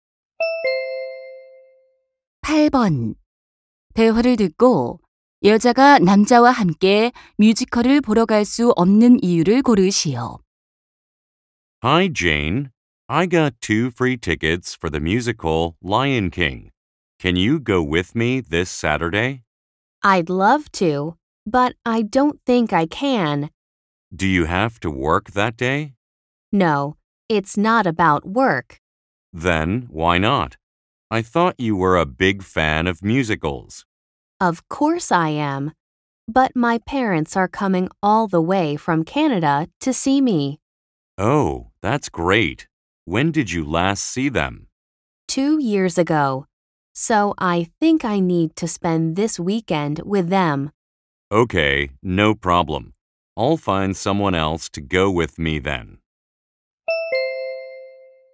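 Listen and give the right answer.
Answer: 캐나다에서 오시는 부모님과 주말을 보내야 해서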